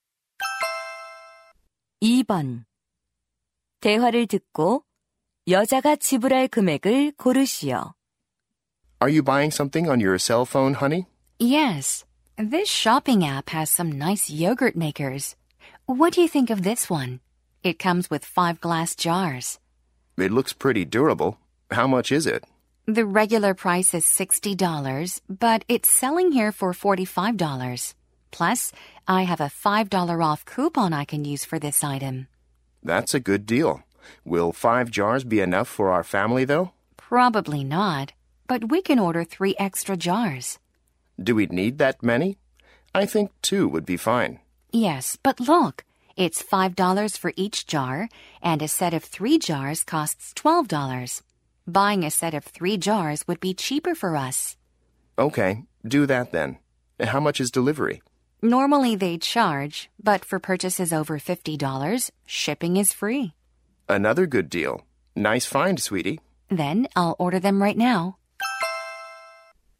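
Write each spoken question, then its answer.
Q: 대화를 듣고 여자가 지불할 금액을 고르시오.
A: $52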